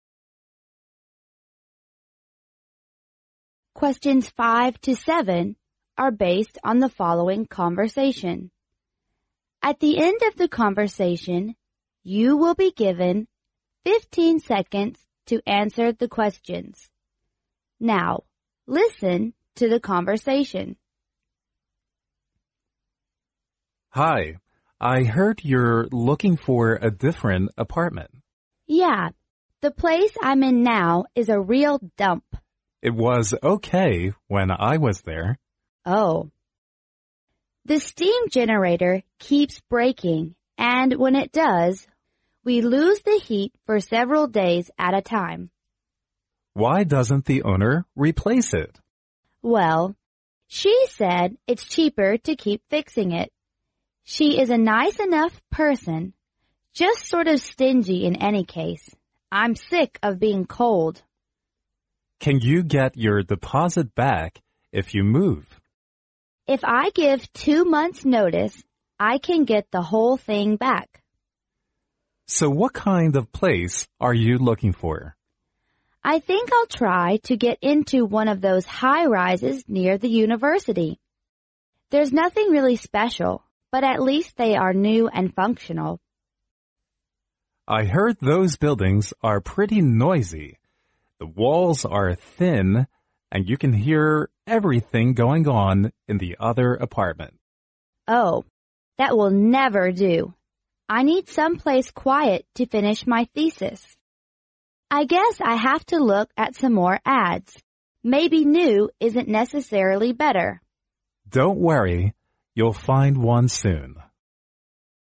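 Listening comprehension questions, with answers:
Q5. What is wrong with the woman's current apartment?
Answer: It can't provide heat continually.

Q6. What must the woman do to have her deposit returned?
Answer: To give two-month notice.

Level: 英语四级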